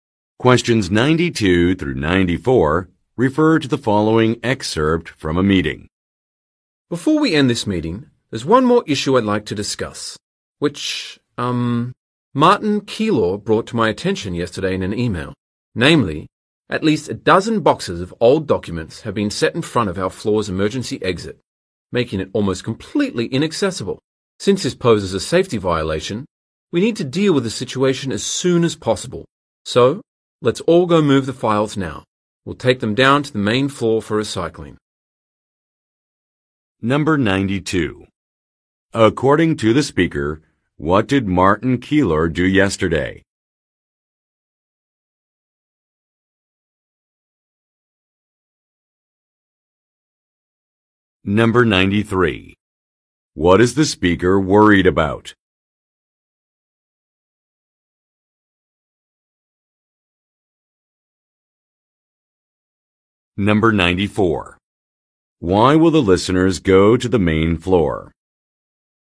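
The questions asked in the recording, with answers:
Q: According to the speaker, what did Martin Keylor do yesterday?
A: He sent an email about an issue

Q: What is the speaker worried about?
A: Boxes blocking the emergency exit, a safety violation

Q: Why will the listeners go to the main floor?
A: To take old documents for recycling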